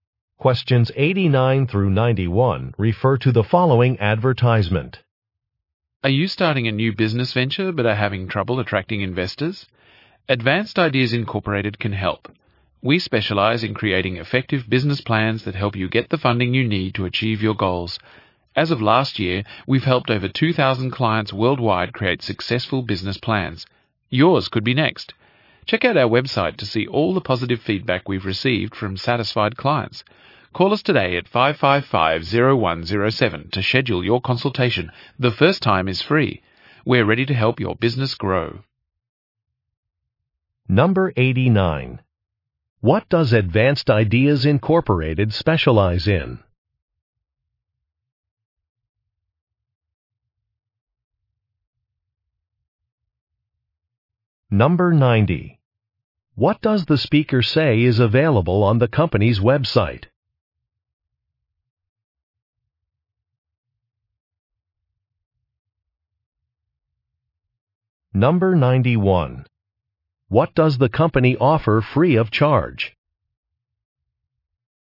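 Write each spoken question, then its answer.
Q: What does Advanced Ideas Incorporated specialize in?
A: Creating business plans

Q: What does the speaker say is available on the company's website?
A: Positive feedback from clients

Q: What does the company offer free of charge?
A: The first consultation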